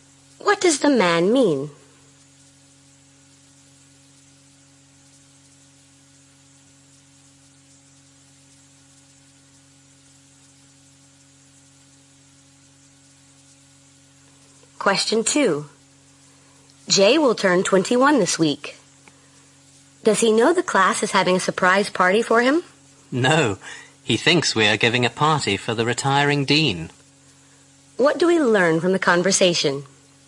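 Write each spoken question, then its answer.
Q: What do we learn from the conversation?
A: Jay doesn't know about his surprise party; he thinks it's a party for the retiring dean.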